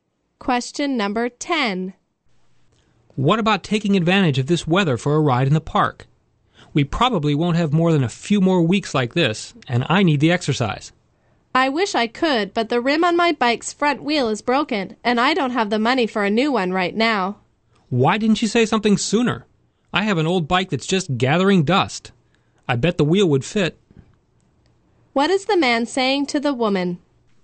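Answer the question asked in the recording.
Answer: She can use the wheel from his old bike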